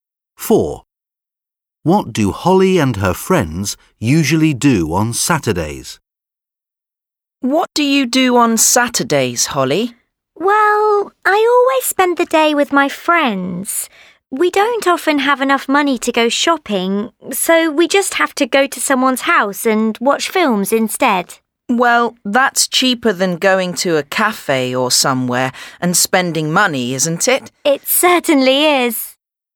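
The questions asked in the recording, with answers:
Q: What do Holly and her friends usually do on Saturdays?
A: Watch films at someone's house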